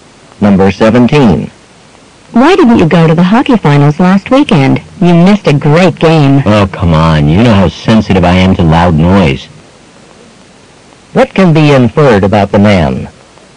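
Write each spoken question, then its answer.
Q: What can be inferred about the man?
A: He avoided the game because of the loud noise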